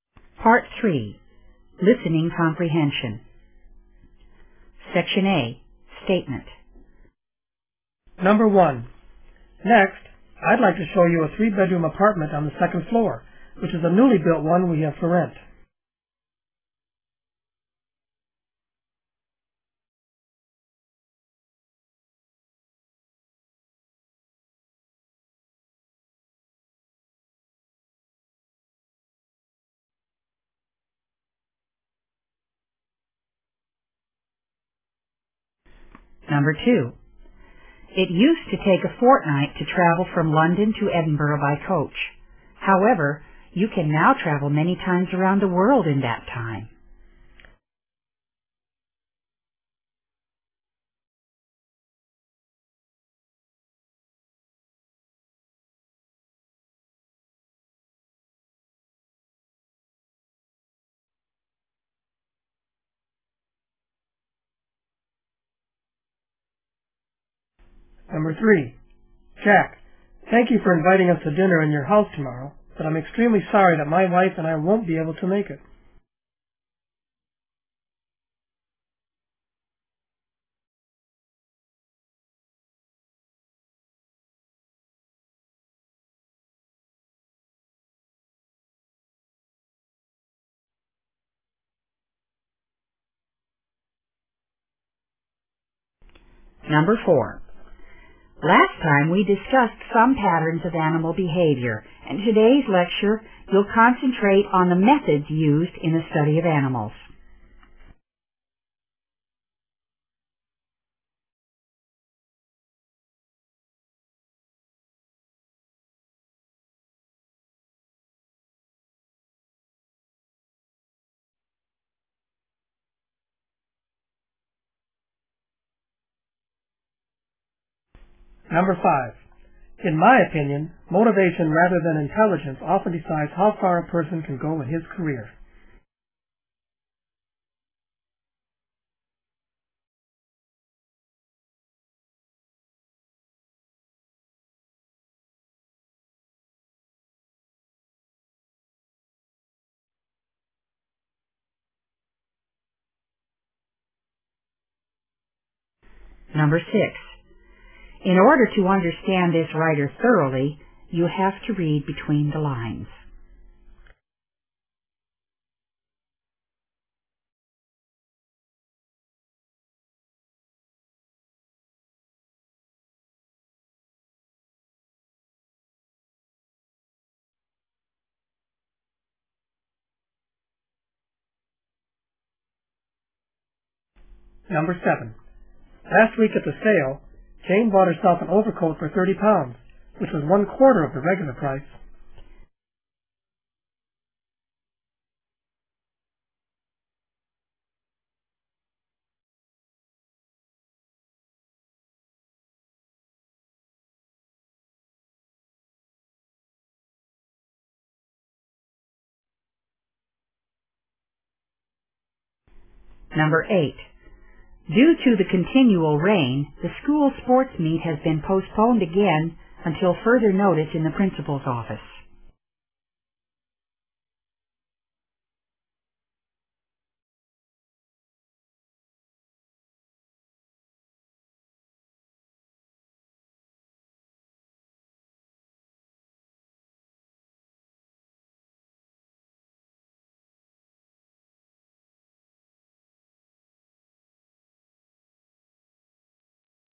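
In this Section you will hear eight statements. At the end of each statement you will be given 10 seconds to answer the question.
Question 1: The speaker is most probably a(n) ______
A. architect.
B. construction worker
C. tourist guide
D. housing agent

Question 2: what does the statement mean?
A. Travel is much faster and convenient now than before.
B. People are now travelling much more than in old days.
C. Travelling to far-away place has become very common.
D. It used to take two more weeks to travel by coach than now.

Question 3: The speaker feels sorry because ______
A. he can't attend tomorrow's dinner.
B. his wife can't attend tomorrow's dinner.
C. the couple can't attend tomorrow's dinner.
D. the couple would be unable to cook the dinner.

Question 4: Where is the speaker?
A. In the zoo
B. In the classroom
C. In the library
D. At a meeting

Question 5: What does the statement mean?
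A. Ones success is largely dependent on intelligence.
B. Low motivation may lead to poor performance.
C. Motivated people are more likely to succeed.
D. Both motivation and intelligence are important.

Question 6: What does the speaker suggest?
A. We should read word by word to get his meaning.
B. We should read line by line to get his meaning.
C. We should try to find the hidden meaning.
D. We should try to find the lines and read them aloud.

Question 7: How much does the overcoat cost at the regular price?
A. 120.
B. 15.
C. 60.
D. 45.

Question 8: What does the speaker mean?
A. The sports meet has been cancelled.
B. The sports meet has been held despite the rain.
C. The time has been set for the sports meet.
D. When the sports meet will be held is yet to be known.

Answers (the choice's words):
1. housing agent
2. Travel is much faster and convenient now than before.
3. the couple can't attend tomorrow's dinner.
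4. In the classroom
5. Motivated people are more likely to succeed.
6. We should try to find the hidden meaning.
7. 120.
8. When the sports meet will be held is yet to be known.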